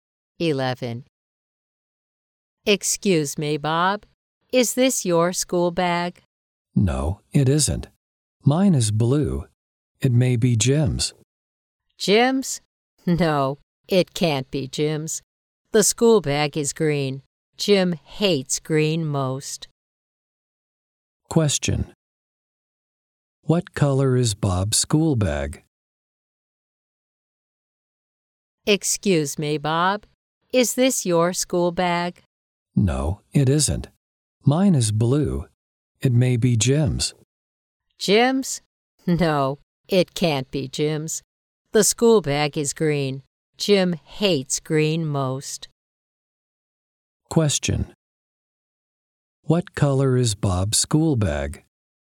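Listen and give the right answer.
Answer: Blue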